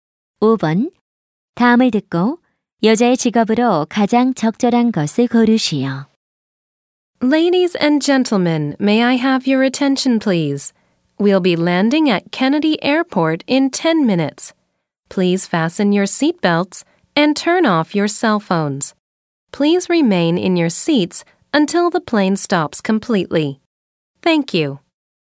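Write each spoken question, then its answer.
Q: 다음을 듣고 여자의 직업으로 가장 적절한 것을 고르시오.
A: 승무원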